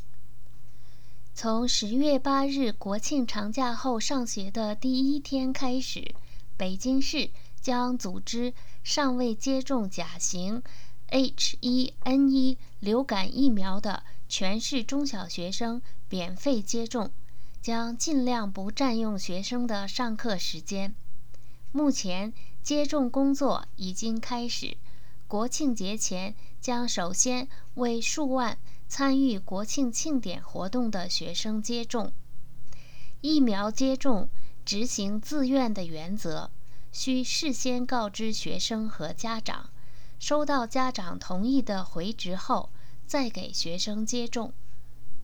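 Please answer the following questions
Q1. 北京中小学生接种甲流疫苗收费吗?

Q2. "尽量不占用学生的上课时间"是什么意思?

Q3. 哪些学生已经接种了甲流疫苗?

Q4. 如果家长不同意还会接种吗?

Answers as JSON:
{"1": "不收费,免费接种", "2": "尽可能安排在课外时间接种,不影响学生上课", "3": "参与国庆庆典活动的数万名学生", "4": "不会,执行自愿原则,收到家长同意的回执后才接种"}

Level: M.Phil Year 2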